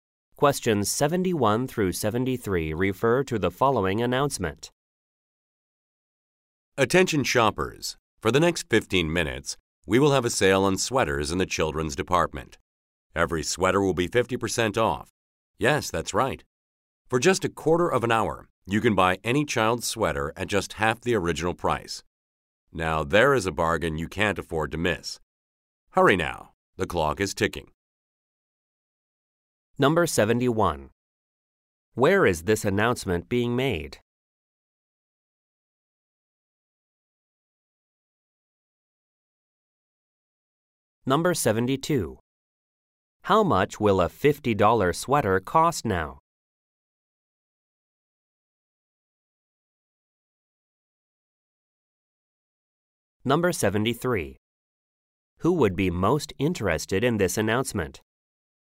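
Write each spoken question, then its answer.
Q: Where is this announcement being made?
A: In a store

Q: How much will a $50 sweater cost now?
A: $25

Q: Who would be most interested in this announcement?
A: Parents shopping for children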